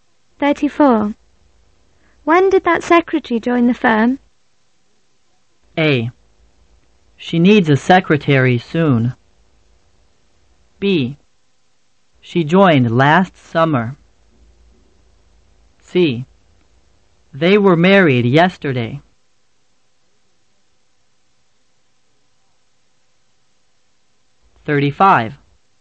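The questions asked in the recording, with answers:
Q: When did that secretary join the firm?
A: B: She joined last summer.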